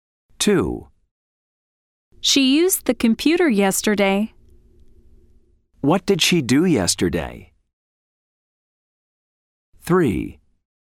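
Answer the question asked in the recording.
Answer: She used the computer.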